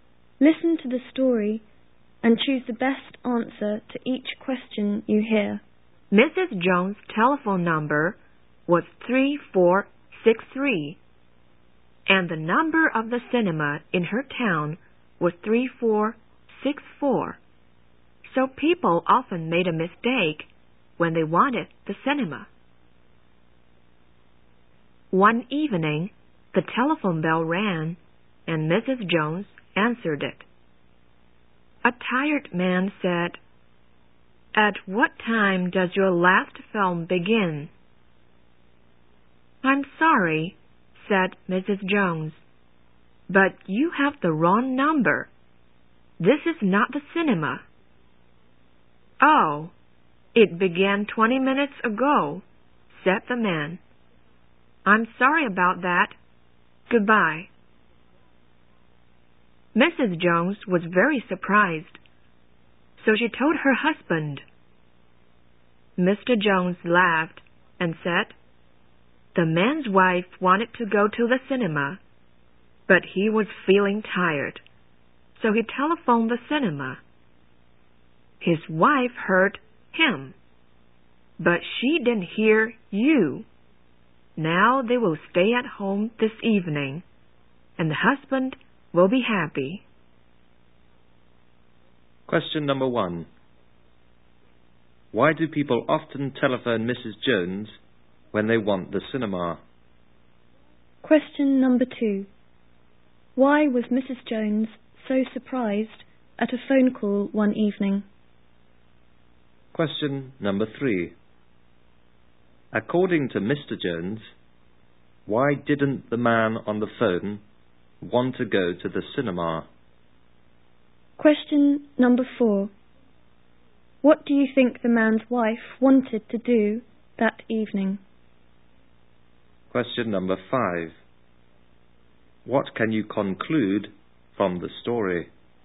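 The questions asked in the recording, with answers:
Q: Why do people often telephone Mrs. Jones when they want the cinema?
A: Her number is almost the same as the cinema's

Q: According to Mr. Jones, why didn't the man on the phone want to go to the cinema?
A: He was feeling tired

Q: What do you think the man's wife wanted to do that evening?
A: Go to the cinema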